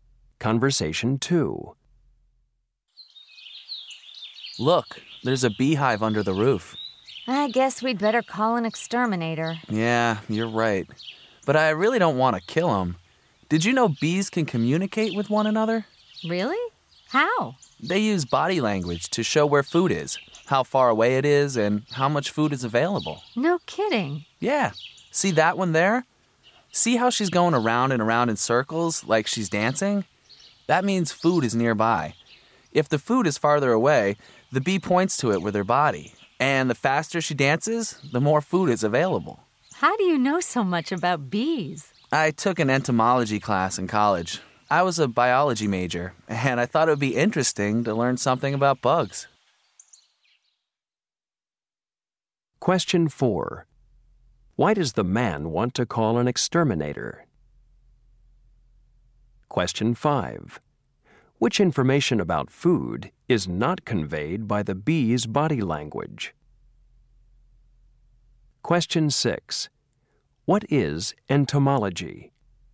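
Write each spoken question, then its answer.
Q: Why does the man want to call an exterminator?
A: There is a beehive under the roof

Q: What is entomology?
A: The study of insects (bugs)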